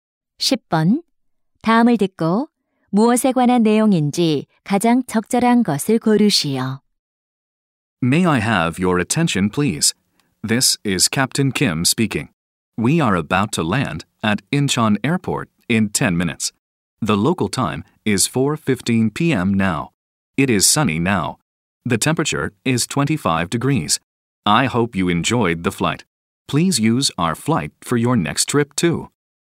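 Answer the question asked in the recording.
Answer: 비행기 착륙 안내 방송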